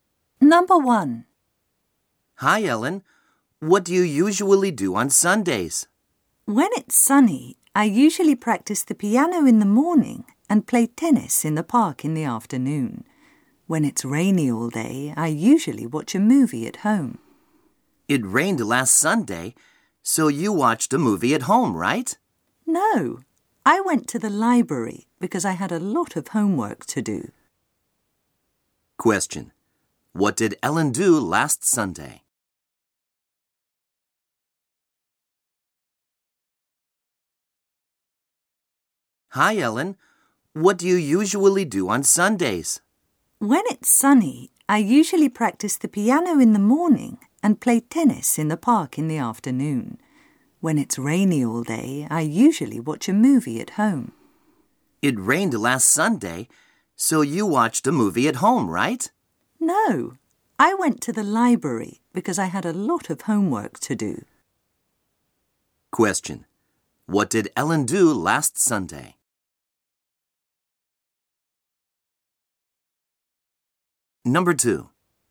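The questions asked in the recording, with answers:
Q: What did Ellen do last Sunday?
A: She went to the library to do her homework.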